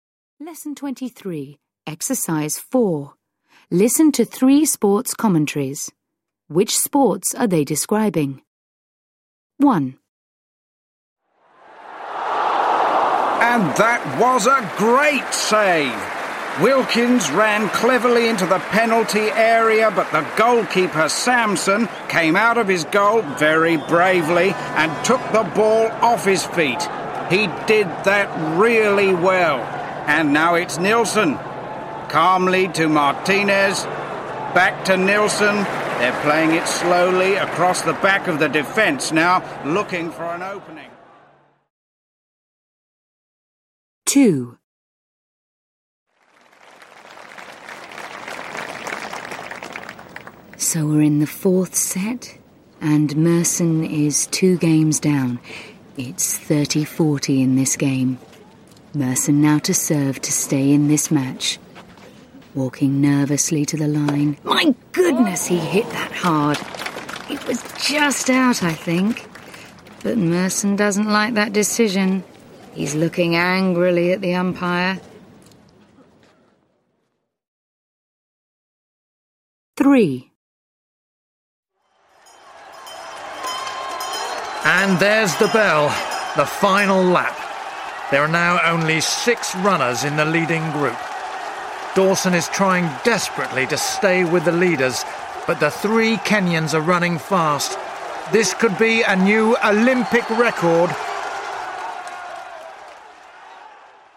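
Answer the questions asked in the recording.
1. football
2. tennis
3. athletics (running race)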